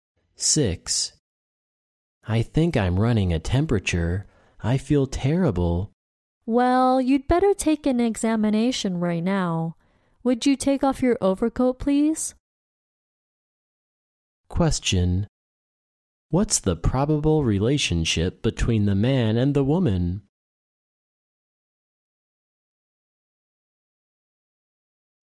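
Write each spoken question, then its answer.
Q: What's the probable relationship between the man and the woman?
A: Patient and doctor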